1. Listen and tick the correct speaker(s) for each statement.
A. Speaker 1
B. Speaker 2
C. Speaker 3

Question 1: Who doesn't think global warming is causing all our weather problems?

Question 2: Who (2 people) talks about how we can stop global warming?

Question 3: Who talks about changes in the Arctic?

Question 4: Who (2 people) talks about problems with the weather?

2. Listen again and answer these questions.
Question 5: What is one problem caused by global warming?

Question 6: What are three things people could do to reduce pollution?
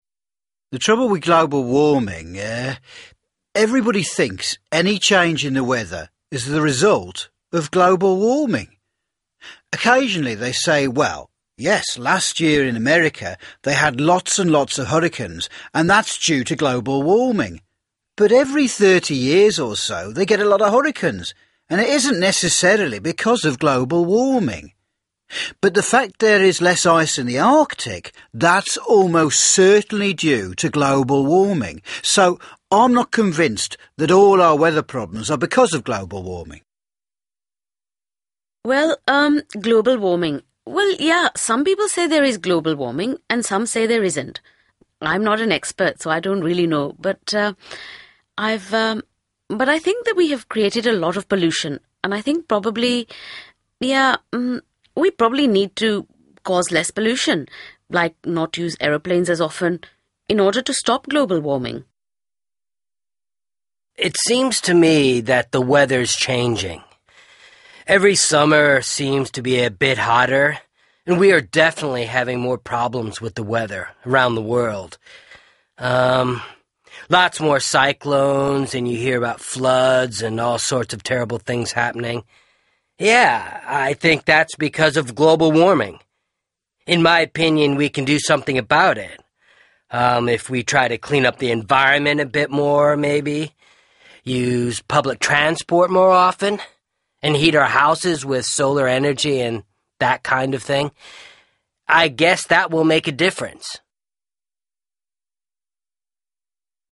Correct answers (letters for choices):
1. A
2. B
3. A
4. A
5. less ice in the Arctic.
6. not use aeroplanes as often

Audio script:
Occasionally they say, well, yes last year in America they had lots and lots of hurricanes and that's due to global warming. But every 30 years or so they get a lot of hurricanes and it isn't necessarily because of global warming. But the fact there is less ice in the Arctic, that's almost certainly due to global warming. So, I'm not convinced that all our weather problems are because of global warming.
Well um global warming, well yeah some people say there is global warming and some say there isn't.
It seems to me that the weather's changing. Every summer seems to be a bit hotter and we are definitely having more problems with the weather around the world. Um, lots more cyclones and you hear about floods and all sorts of terrible things happening. Yeah I think that's because of global warming.